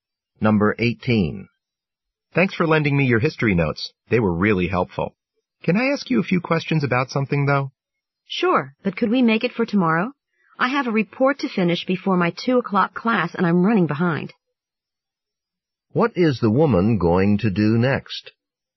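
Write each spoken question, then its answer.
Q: What is the woman going to do next?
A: Finish her report.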